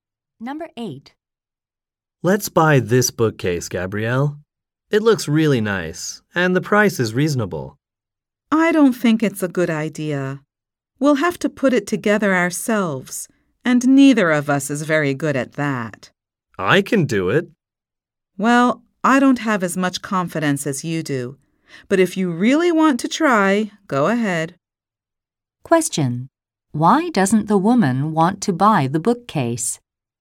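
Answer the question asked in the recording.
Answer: They must assemble it themselves and aren't good at that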